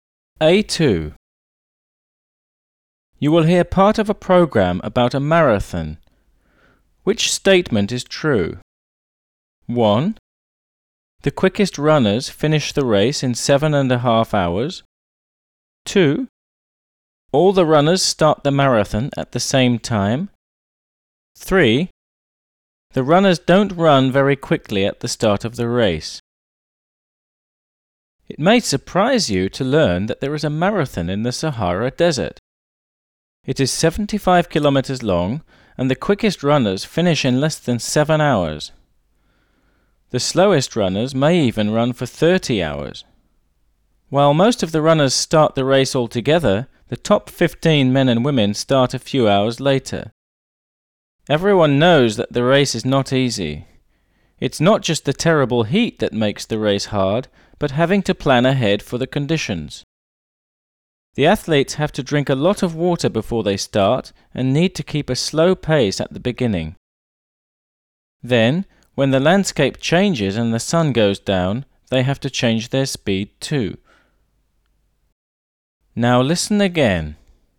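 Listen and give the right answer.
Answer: 3: The runners don't run very quickly at the start of the race.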